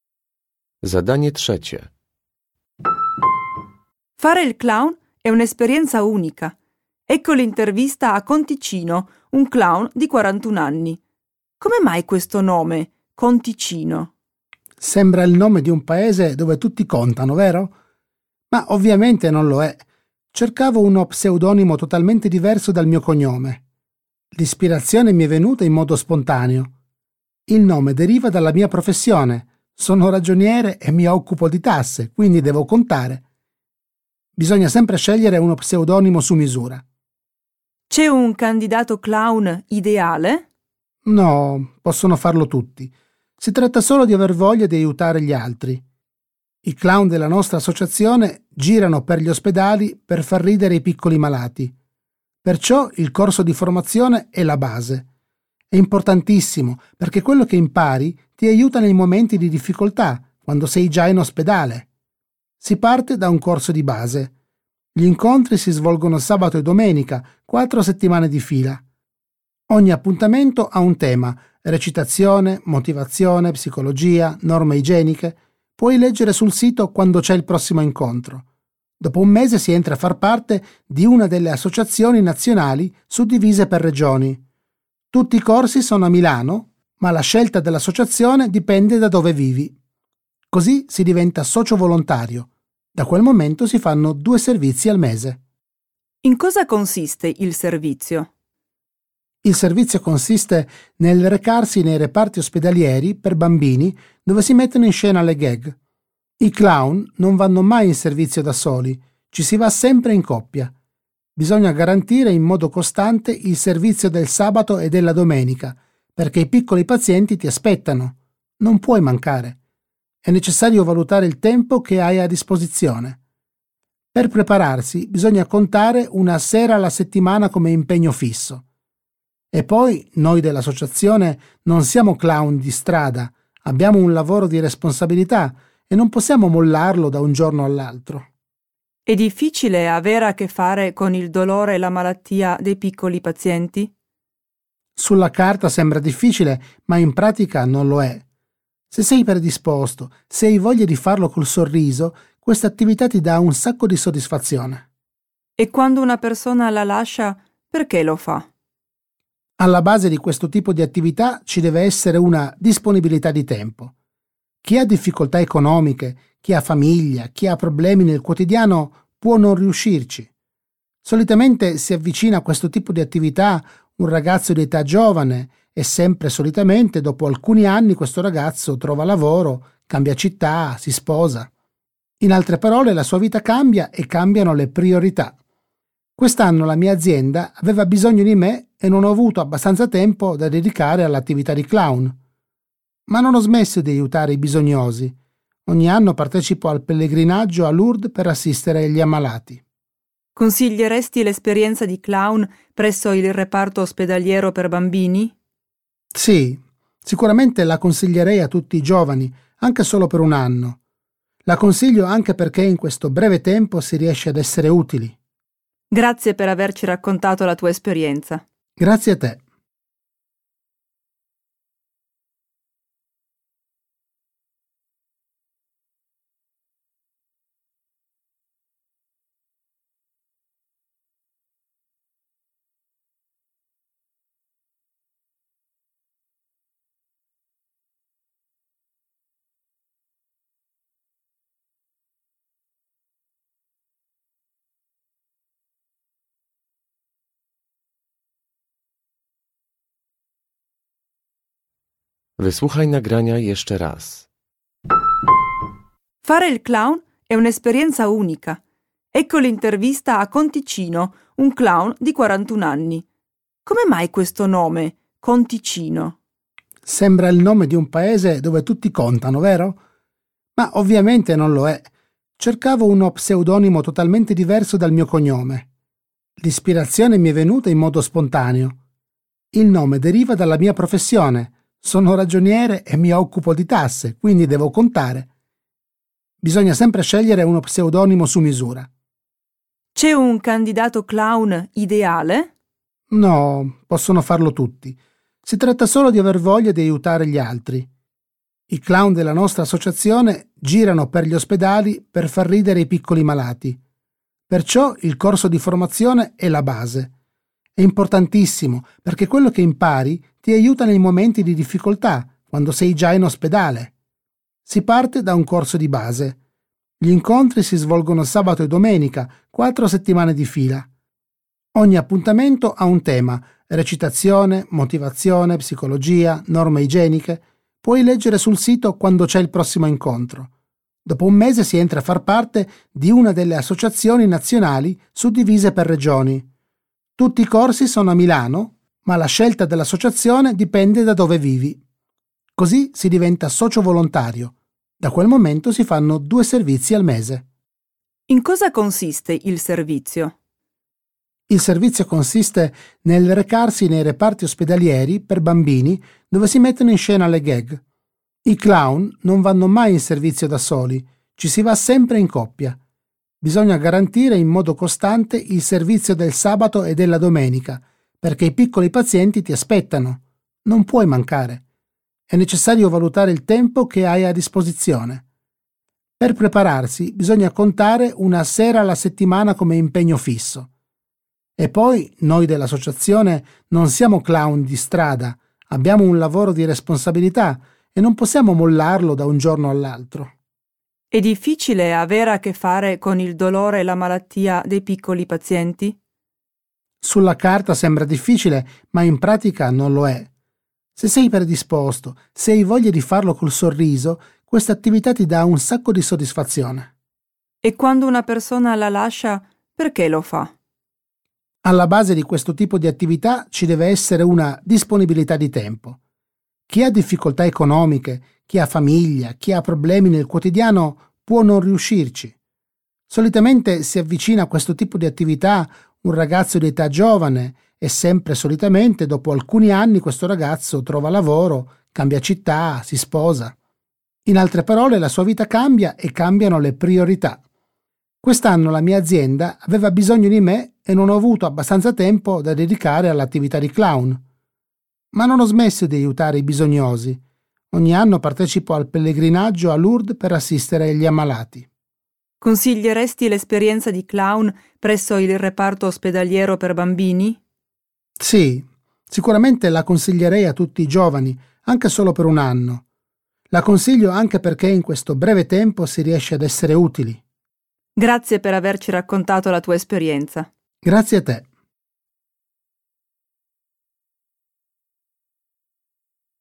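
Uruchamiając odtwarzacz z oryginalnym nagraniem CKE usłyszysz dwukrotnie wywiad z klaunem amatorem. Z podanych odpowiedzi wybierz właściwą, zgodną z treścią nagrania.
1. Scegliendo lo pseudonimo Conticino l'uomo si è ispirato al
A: suo lavoro di ragioniere

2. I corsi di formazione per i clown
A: si svolgono a Milano nei fine settimana per quattro settimane

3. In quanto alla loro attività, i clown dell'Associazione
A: vanno sempre in servizio in coppia

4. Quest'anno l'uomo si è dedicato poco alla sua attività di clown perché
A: la sua azienda aveva bisogno di lui

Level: Poziom: rozszerzony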